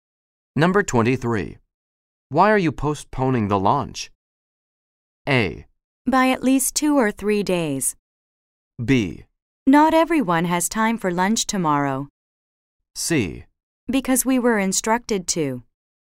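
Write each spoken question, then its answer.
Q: Why are you postponing the launch?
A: C: Because we were instructed to.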